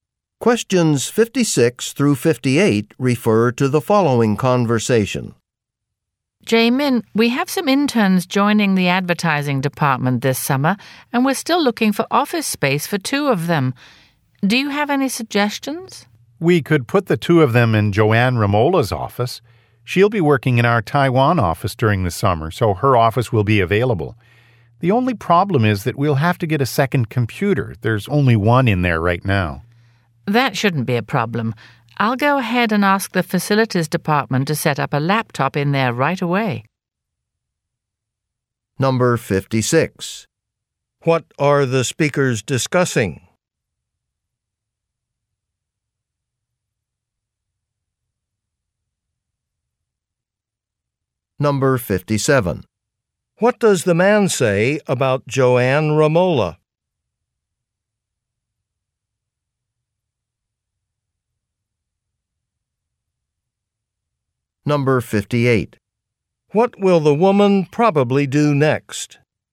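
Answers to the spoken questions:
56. Office space for summer interns
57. She will work in the Taiwan office this summer
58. Ask the facilities department to set up a laptop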